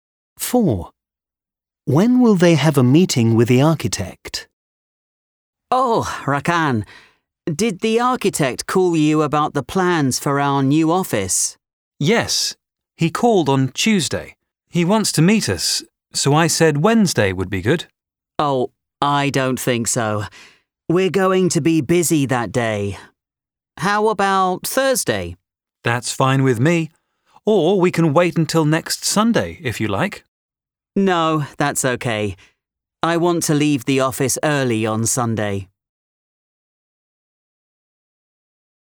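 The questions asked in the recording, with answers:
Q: When will they have a meeting with the architect?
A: Thursday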